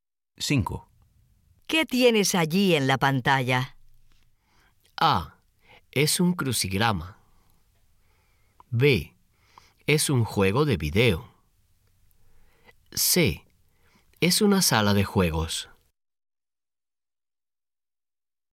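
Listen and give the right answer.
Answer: B: Es un juego de video.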